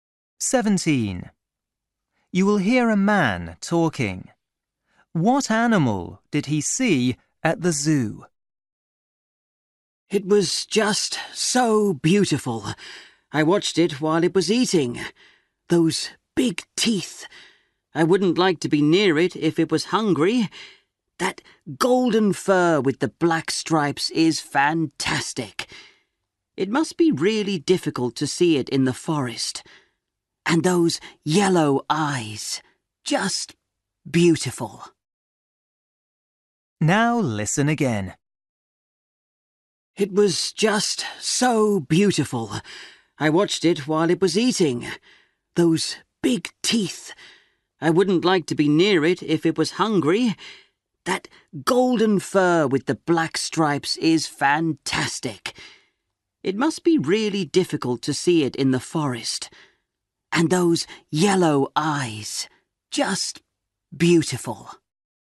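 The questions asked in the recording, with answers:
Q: What animal did he see at the zoo?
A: A tiger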